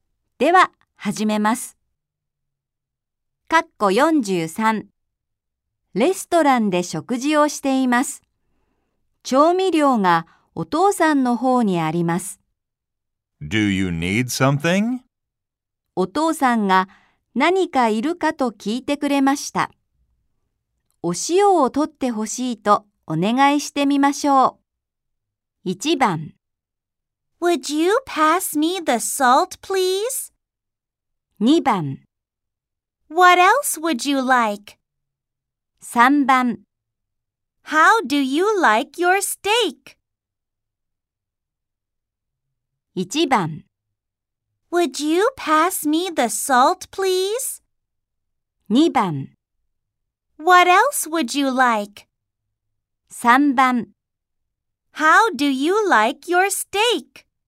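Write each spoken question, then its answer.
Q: お父さんが何かいるかと聞いてくれました。お塩を取ってほしいとお願いしてみましょう。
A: 1: Would you pass me the salt, please?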